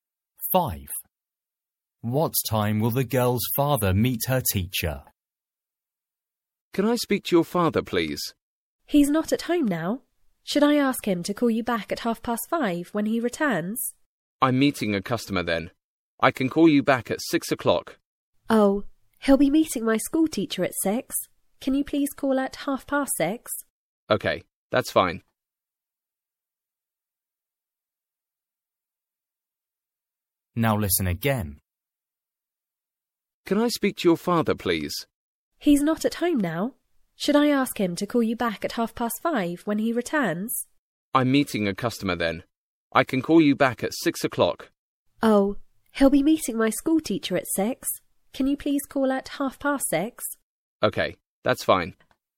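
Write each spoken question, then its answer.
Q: What time will the girl's father meet her teacher?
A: 6:00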